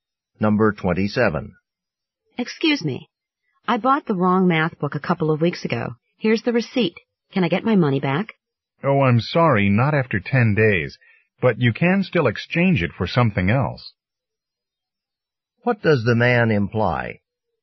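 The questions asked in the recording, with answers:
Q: What does the man imply?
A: She can't get a refund, but she can exchange the book.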